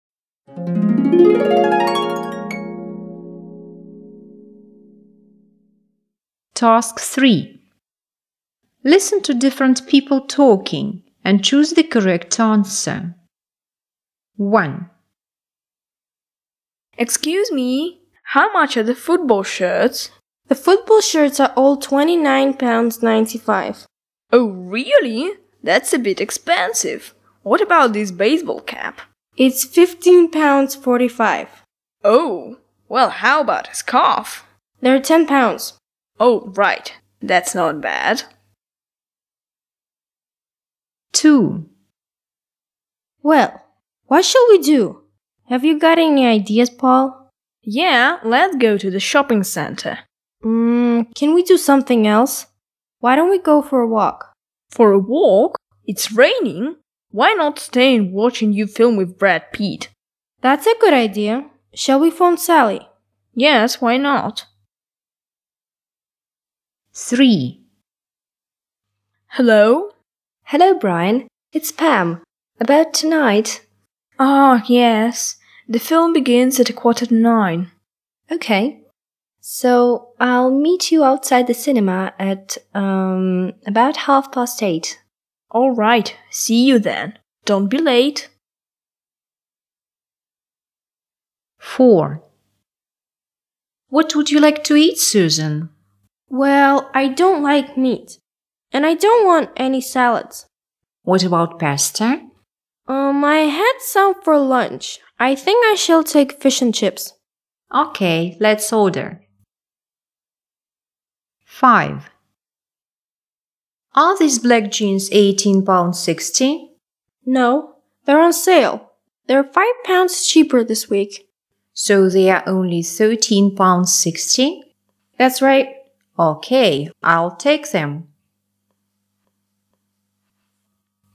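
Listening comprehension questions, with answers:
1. What does he buy?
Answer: a scarf

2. What will they do?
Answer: watch TV

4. What does Susan want to eat?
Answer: fish and chips

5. How much are the jeans?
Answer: ?13.60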